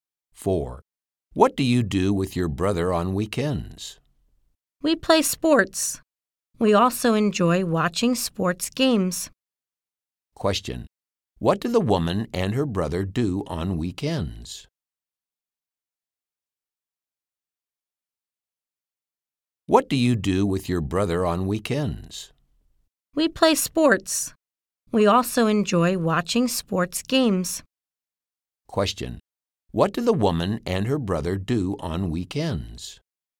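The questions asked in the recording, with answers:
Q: Question, what do the woman and her brother do on weekends?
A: They play sports and watch sports games.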